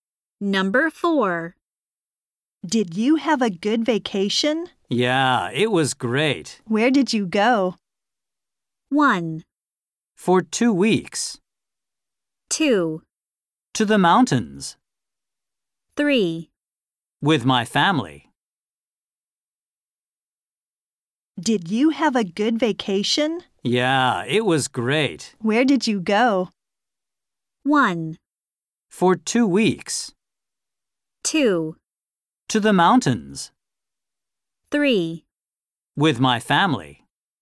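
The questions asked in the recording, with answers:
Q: Where did you go?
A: 2: To the mountains.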